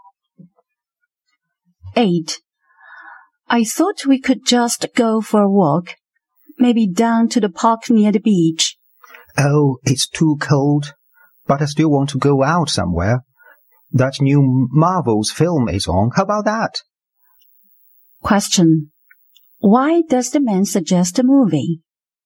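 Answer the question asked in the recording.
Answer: It's too cold for a walk, but the woman still wants to go out.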